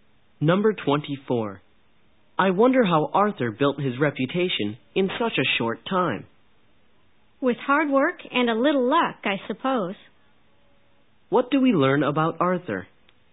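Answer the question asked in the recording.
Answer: He built his reputation through hard work and some luck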